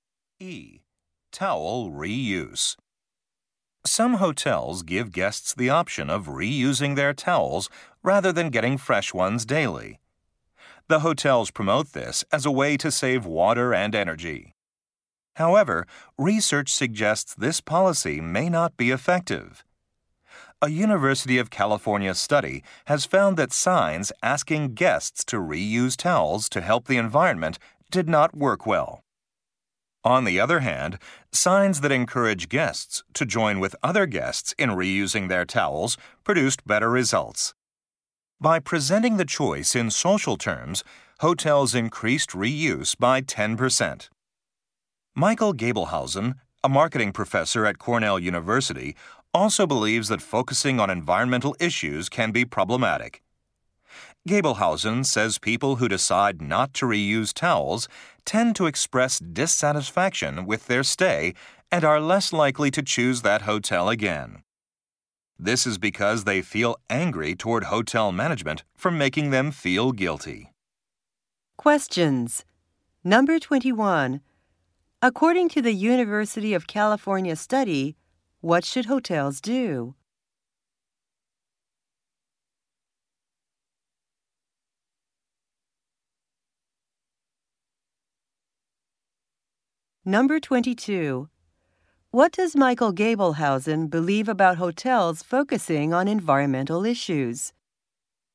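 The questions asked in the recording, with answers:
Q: According to the University of California study, what should hotels do?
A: Encourage guests to join other guests in reusing towels.

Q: What does Michael Gabelhausen believe about hotels focusing on environmental issues?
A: It can make guests feel guilty and less likely to return.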